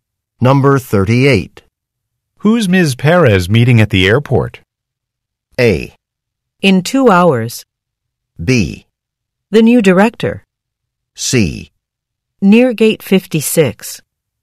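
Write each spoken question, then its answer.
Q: Who's Ms. Perez meeting at the airport?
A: B: The new director.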